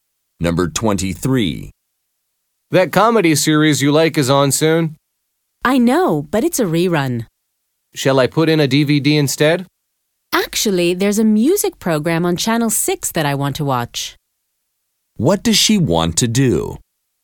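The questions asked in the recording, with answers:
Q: What does she want to do?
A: Watch a music program on Channel 6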